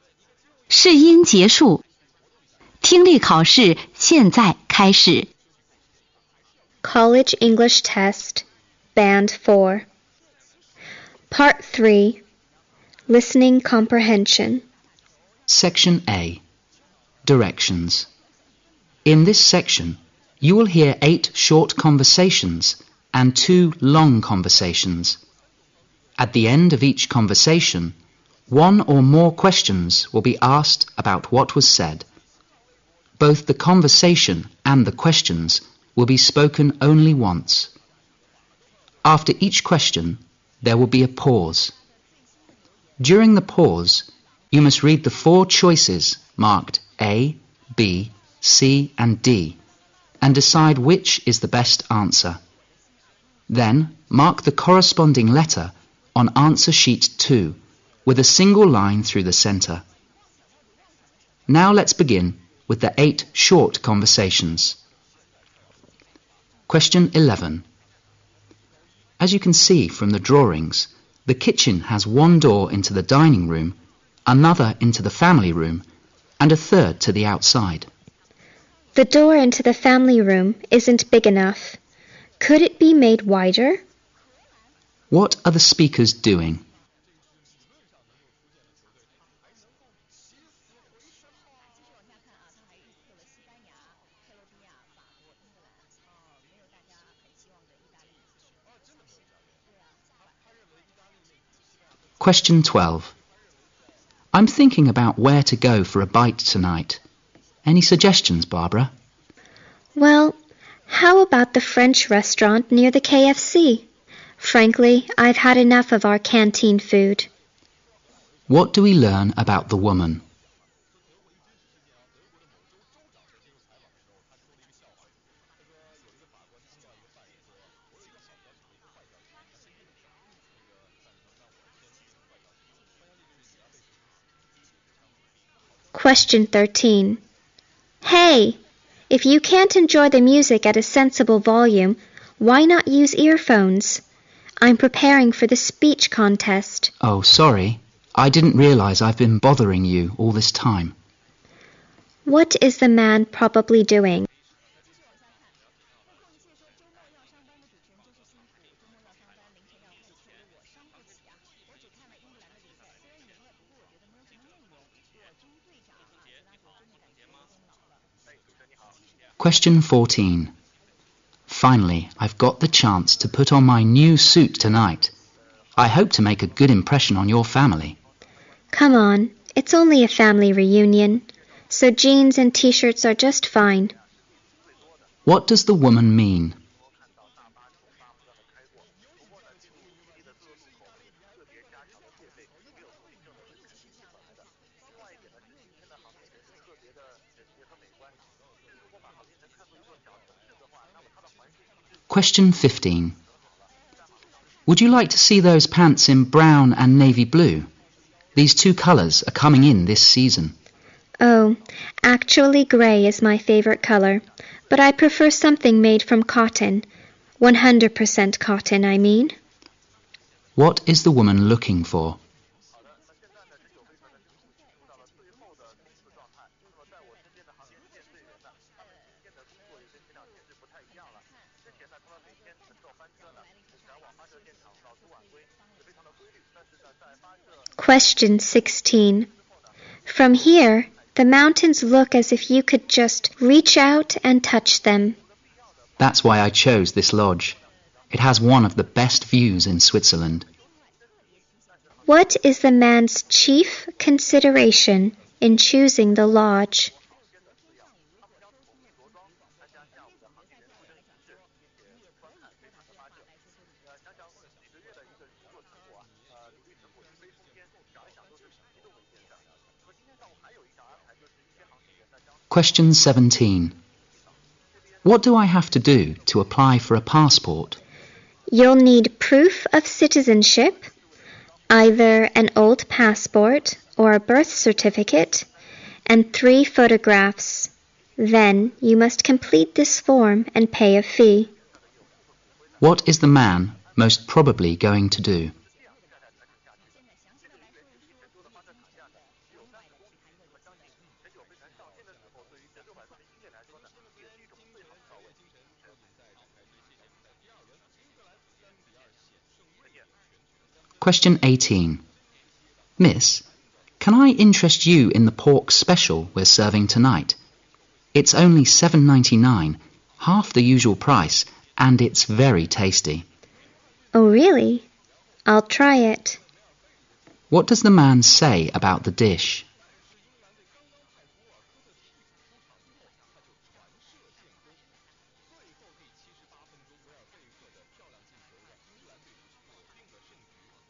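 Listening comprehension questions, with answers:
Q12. What do we learn about the woman?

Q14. What does the woman mean?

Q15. What is the woman looking for?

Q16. What is the man's chief consideration in choosing the lodge?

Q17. What is the man most probably going to do?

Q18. What does the man say about the dish?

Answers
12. She is tired of the canteen food and wants to eat out.
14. He doesn't need to dress formally.
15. Grey pants made of 100% cotton.
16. The view.
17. Fill in a form to apply for a passport.
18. It is half the usual price and tasty.

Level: 四级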